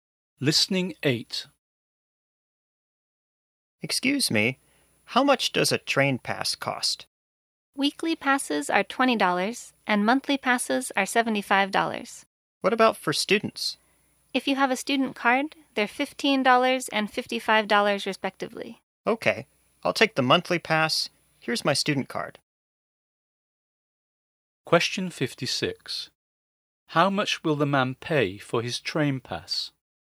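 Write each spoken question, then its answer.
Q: How much will the man pay for his train pass?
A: $55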